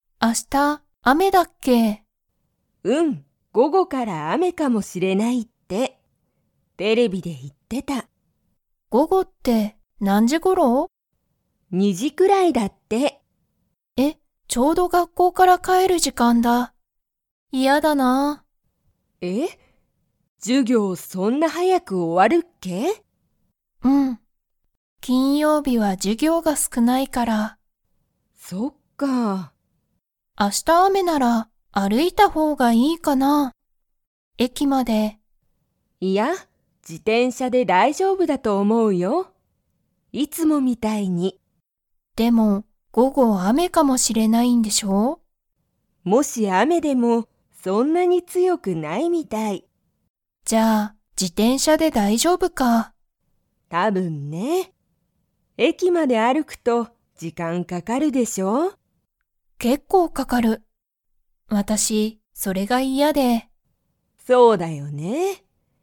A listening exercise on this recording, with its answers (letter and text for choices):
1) 娘むすめは、 は授業じゅぎょうが少すくない。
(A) 火曜日かようび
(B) 水曜日すいようび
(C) 木曜日もくようび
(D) 金曜日きんようび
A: (D) 金曜日きんようび

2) 娘むすめは明日あした、駅えきまで歩あるいていきますか?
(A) はい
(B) いいえ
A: (B) いいえ

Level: Level 3